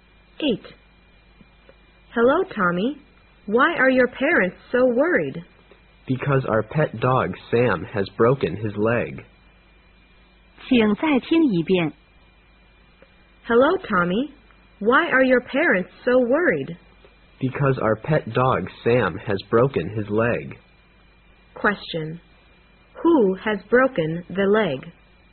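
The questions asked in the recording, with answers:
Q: Who has broken the leg?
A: Sam, the pet dog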